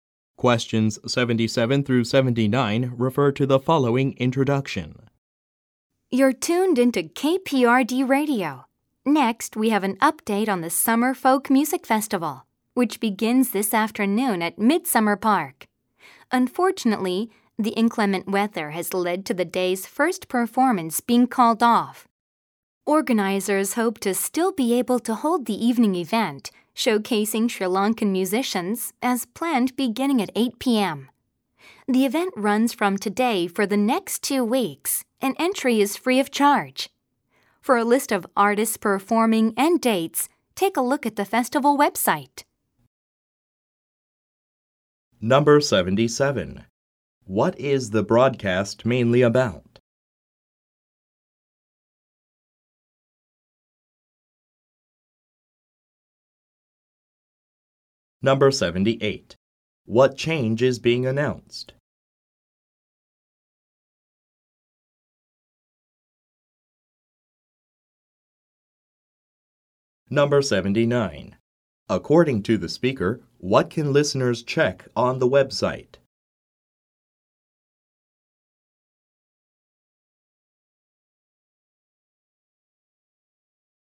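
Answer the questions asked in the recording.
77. The Summer Folk Music Festival
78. The day's first performance has been canceled because of bad weather
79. A list of performing artists and dates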